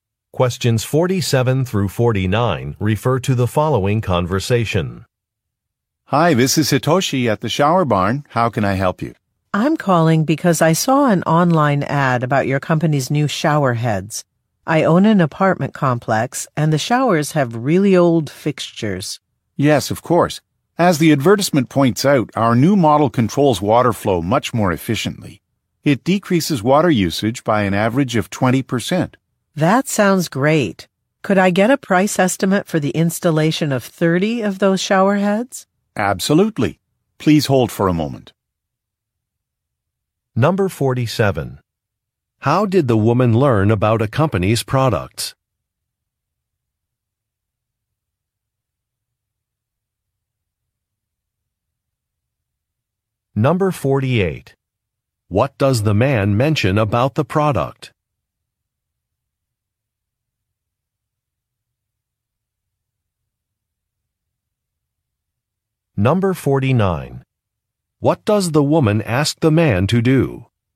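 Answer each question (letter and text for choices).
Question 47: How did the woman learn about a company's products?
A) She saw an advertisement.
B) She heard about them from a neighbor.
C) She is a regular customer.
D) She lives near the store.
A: A) She saw an advertisement.

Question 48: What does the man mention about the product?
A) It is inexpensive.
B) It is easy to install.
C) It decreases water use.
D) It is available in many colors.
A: C) It decreases water use.

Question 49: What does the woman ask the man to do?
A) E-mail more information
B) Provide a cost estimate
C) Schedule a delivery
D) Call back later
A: B) Provide a cost estimate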